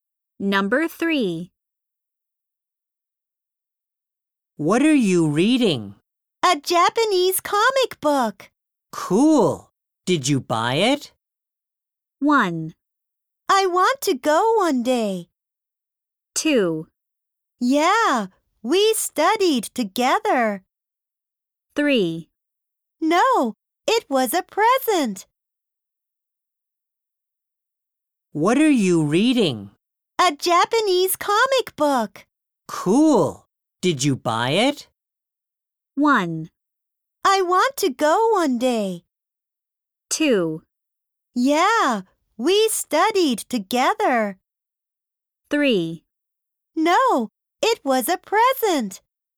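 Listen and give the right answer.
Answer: 3: No, it was a present.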